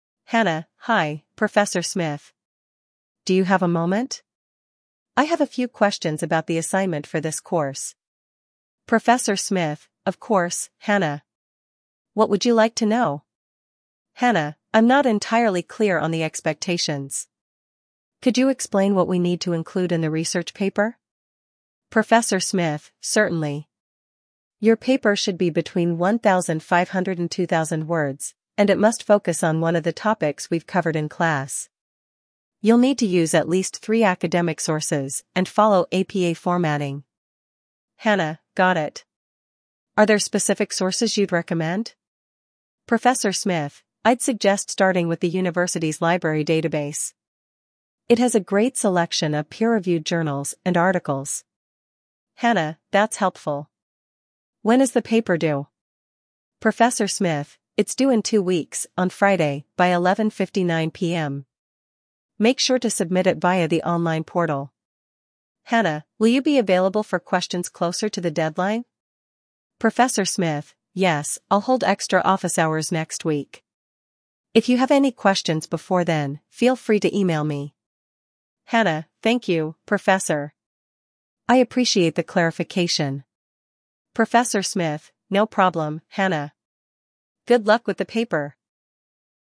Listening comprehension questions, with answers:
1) What type of assignment is Hannah asking about?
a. A group project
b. A research paper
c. A presentation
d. Weekly quizzes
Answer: b. A research paper

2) When is the assignment due?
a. End of the month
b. Next Monday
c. In two weeks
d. By the end of the semester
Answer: c. In two weeks

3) What specific requirement does the professor mention for the assignment?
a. It must include at least three sources.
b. It should be submitted as a hard copy only.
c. It requires collaboration with a classmate.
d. It must follow APA formatting.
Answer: d. It must follow APA formatting.

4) What does the professor suggest Hannah do if she has further questions?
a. Email him directly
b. Attend office hours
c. Ask her classmates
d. Consult the course syllabus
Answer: b. Attend office hours

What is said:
Hannah: Hi, Professor Smith. Do you have a moment? I have a few questions about the assignment for this course.
Professor Smith: Of course, Hannah. What would you like to know?
Hannah: I'm not entirely clear on the expectations. Could you explain what we need to include in the research paper?
Professor Smith: Certainly. Your paper should be between 1,500 and 2,000 words, and it must focus on one of the topics we've covered in class. You'll need to use at least three academic sources and follow APA formatting.
Hannah: Got it. Are there specific sources you'd recommend?
Professor Smith: I'd suggest starting with the university's library database. It has a great selection of peer-reviewed journals and articles.
Hannah: That's helpful. When is the paper due?
Professor Smith: It's due in two weeks, on Friday, by 11:59 PM. Make sure to submit it via the online portal.
Hannah: Will you be available for questions closer to the deadline?
Professor Smith: Yes, I'll hold extra office hours next week. If you have any questions before then, feel free to email me.
Hannah: Thank you, Professor. I appreciate the clarification.
Professor Smith: No problem, Hannah. Good luck with the paper!

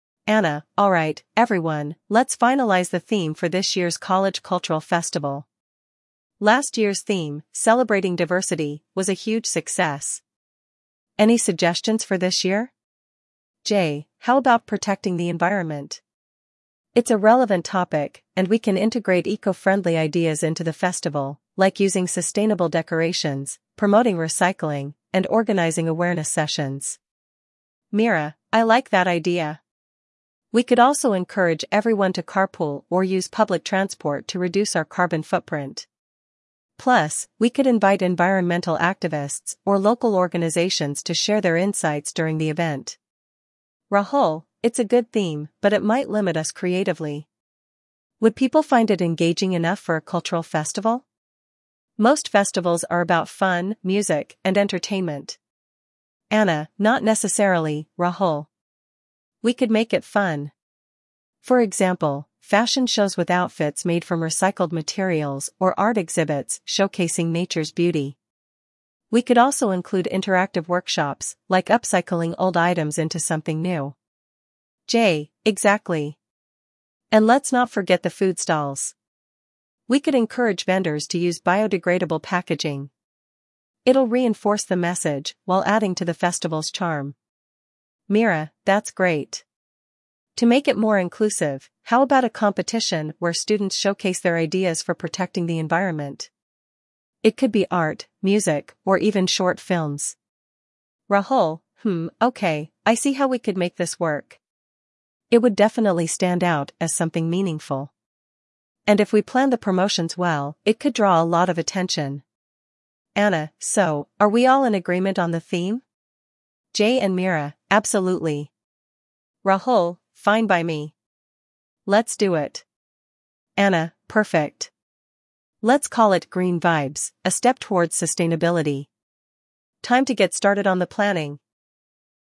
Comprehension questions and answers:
Choose the best way to answer each question.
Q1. What was the theme of last year's cultural festival?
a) Protecting the Environment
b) Celebrating Diversity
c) Cultural Heritage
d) Artistic Expression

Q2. What is Jay's main suggestion for this year's festival theme?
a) Celebrating music and entertainment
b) Promoting environmental awareness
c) Focusing on cultural traditions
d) Highlighting student achievements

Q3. How does Meera suggest reducing the event's carbon footprint?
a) Organizing a tree-planting drive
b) Encouraging the use of public transport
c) Limiting the number of attendees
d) Using solar energy for the event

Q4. What concern does Rahul raise about the proposed theme?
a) It might be too costly to implement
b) It could be too serious for a cultural festival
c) It might not attract enough participants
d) It could conflict with the college budget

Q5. What activity does Anna propose to make the event engaging?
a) A debate on environmental issues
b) Interactive workshops on upcycling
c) A presentation by environmental scientists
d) A campus-wide clean-up drive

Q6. How does Jay suggest vendors can contribute to the theme?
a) By using eco-friendly packaging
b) By offering discounts on organic products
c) By donating profits to environmental charities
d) By reducing food prices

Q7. What inclusive activity does Meera propose for the festival?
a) A recycling drive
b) A student competition showcasing environmental ideas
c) A campaign to ban single-use plastics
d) A lecture series on climate change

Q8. What is the final agreed-upon name for the festival?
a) Green Life: A Call for Action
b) Eco Vibes: Living Sustainably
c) Green Vibes: A Step Towards Sustainability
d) Nature's Call: Protect the Planet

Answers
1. b) Celebrating Diversity
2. b) Promoting environmental awareness
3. b) Encouraging the use of public transport
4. b) It could be too serious for a cultural festival
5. b) Interactive workshops on upcycling
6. a) By using eco-friendly packaging
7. b) A student competition showcasing environmental ideas
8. c) Green Vibes: A Step Towards Sustainability

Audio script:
Anna: Alright, everyone, let's finalize the theme for this year's college cultural festival. Last year's theme, "Celebrating Diversity," was a huge success. Any suggestions for this year?
Jay: How about "Protecting the Environment"? It's a relevant topic, and we can integrate eco-friendly ideas into the festival—like using sustainable decorations, promoting recycling, and organizing awareness sessions.
Meera: I like that idea! We could also encourage everyone to carpool or use public transport to reduce our carbon footprint. Plus, we could invite environmental activists or local organizations to share their insights during the event.
Rahul: It's a good theme, but it might limit us creatively. Would people find it engaging enough for a cultural festival? Most festivals are about fun, music, and entertainment.
Anna: Not necessarily, Rahul. We could make it fun! For example, fashion shows with outfits made from recycled materials or art exhibits showcasing nature's beauty. We could also include interactive workshops, like upcycling old items into something new.
Jay: Exactly! And let's not forget the food stalls. We could encourage vendors to use biodegradable packaging. It'll reinforce the message while adding to the festival's charm.
Meera: That's great. To make it more inclusive, how about a competition where students showcase their ideas for protecting the environment? It could be art, music, or even short films.
Rahul: Hmm, okay, I see how we could make this work. It would definitely stand out as something meaningful. And if we plan the promotions well, it could draw a lot of attention.
Anna: So, are we all in agreement on the theme?
Jay and Meera: Absolutely.
Rahul: Fine by me. Let's do it.
Anna: Perfect. Let's call it "Green Vibes: A Step Towards Sustainability." Time to get started on the planning!

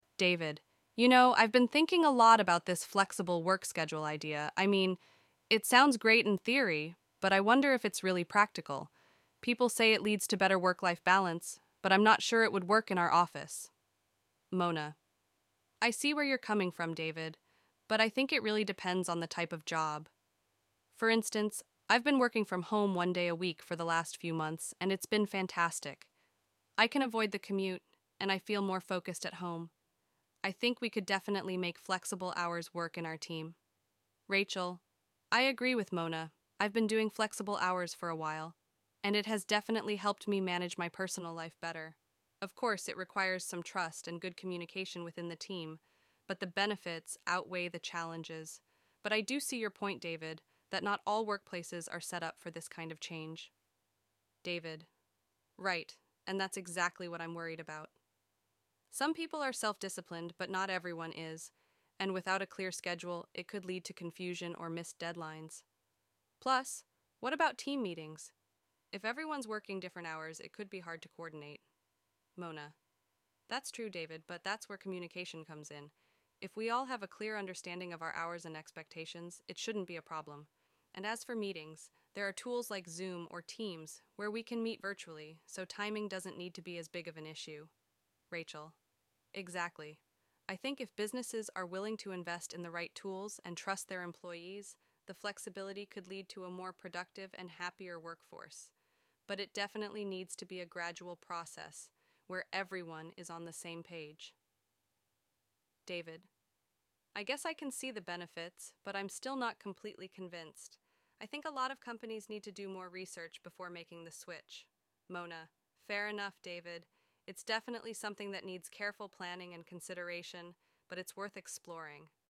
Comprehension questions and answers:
Choose right answer:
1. What is David's main concern about flexible work schedules?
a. It may improve communication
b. It may lead to better work-life balance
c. It could cause confusion and missed deadlines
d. It would make team meetings easier to coordinate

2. Mona believes that flexible work schedules work best for ________ jobs.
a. all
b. office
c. specific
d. managerial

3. According to Rachel, what is essential for making flexible work schedules successful?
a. Strict supervision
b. Trust and good communication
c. Clear office hours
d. More vacation time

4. What tool does Mona suggest can help with team meetings if employees have different work hours?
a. Skype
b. Email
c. Zoom or Teams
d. Telephone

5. Rachel believes that if businesses invest in the right tools, flexible work schedules can lead to a ________ workforce.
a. less productive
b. happier and more productive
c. less satisfied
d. frustrated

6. What does David think companies need to do before implementing flexible work schedules?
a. Research the benefits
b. Implement a trial period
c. Train employees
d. Invest in more tools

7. How does Mona feel about the idea of flexible work schedules?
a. She's not sure it will work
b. She thinks it's not feasible in their team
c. She thinks it's worth exploring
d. She's strongly opposed to it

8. According to the conversation, flexible work schedules could be challenging without ________.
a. a clear schedule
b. more vacations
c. proper training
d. longer work hours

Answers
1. c. It could cause confusion and missed deadlines
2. c. specific
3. b. Trust and good communication
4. c. Zoom or Teams
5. b. happier and more productive
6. a. Research the benefits
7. c. She thinks it's worth exploring
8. a. a clear schedule

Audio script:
David:
You know, I've been thinking a lot about this flexible work schedule idea. I mean, it sounds great in theory, but I wonder if it's really practical. People say it leads to better work-life balance, but I'm not sure it would work in our office.
Mona:
I see where you're coming from, David, but I think it really depends on the type of job. For instance, I've been working from home one day a week for the last few months, and it's been fantastic. I can avoid the commute, and I feel more focused at home. I think we could definitely make flexible hours work in our team.
Rachel:
I agree with Mona. I've been doing flexible hours for a while, and it has definitely helped me manage my personal life better. Of course, it requires some trust and good communication within the team, but the benefits outweigh the challenges. But I do see your point, David, that not all workplaces are set up for this kind of change.
David:
Right, and that's exactly what I'm worried about. Some people are self-disciplined, but not everyone is, and without a clear schedule, it could lead to confusion or missed deadlines. Plus, what about team meetings? If everyone's working different hours, it could be hard to coordinate.
Mona:
That's true, David, but that's where communication comes in. If we all have a clear understanding of our hours and expectations, it shouldn't be a problem. And as for meetings, there are tools like Zoom or Teams where we can meet virtually, so timing doesn't need to be as big of an issue.
Rachel:
Exactly. I think if businesses are willing to invest in the right tools and trust their employees, the flexibility could lead to a more productive and happier workforce. But it definitely needs to be a gradual process, where everyone is on the same page.
David:
I guess I can see the benefits, but I'm still not completely convinced. I think a lot of companies need to do more research before making the switch.
Mona:
Fair enough, David. It's definitely something that needs careful planning and consideration, but it's worth exploring.

